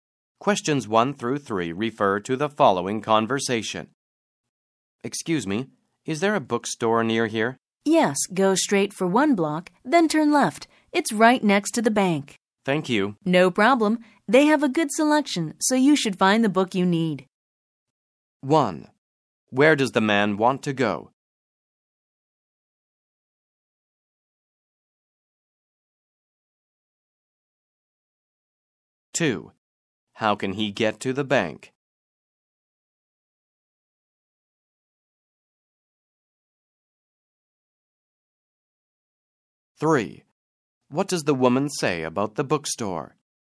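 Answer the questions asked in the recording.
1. To a bookstore
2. Go straight for one block, then turn left
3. It has a good selection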